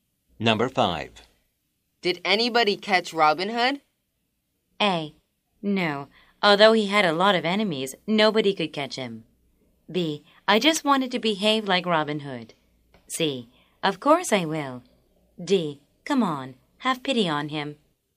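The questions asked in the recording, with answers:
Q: Did anybody catch Robin Hood?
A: A: No. Although he had a lot of enemies, nobody could catch him.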